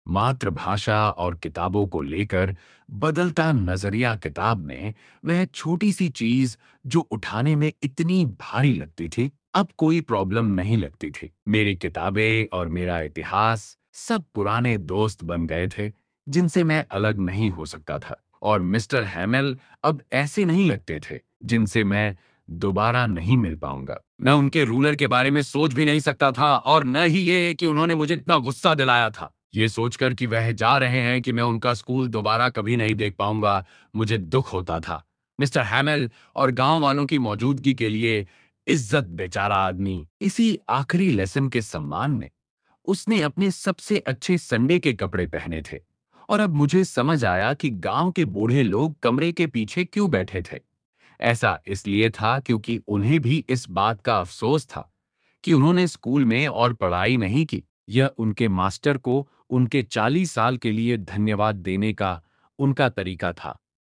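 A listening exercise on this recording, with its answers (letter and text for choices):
How did Franz's feelings about M. Hamel change?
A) He started hating him more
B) He felt sorry for him and forgot his ruler and crankiness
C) He became afraid of his strictness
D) He felt happy that M. Hamel was leaving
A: B) He felt sorry for him and forgot his ruler and crankiness

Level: Class 12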